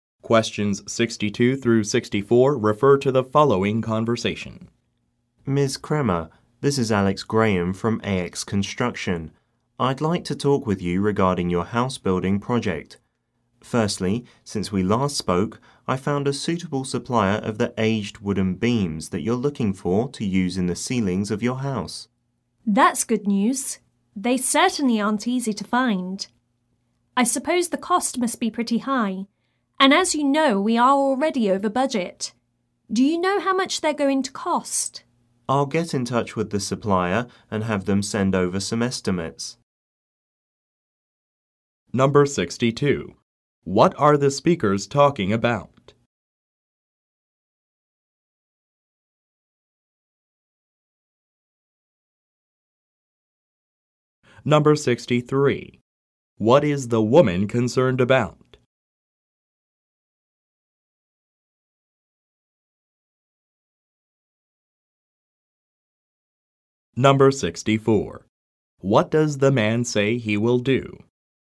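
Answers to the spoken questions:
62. A house building project (wooden beams for the ceilings)
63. The cost, since they are already over budget
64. Contact the supplier and have them send estimates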